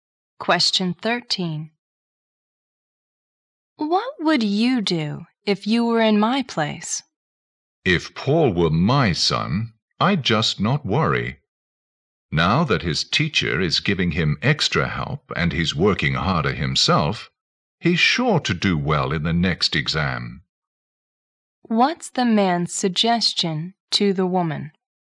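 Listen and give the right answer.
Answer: She shouldn't worry about Paul.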